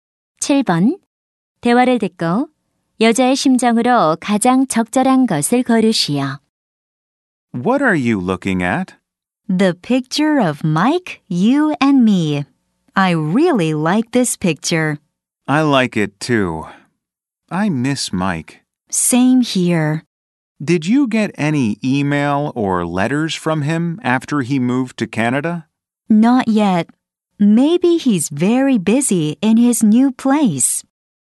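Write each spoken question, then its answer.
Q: 대화를 듣고 여자의 심정으로 가장 적절한 것을 고르시오.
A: 그리운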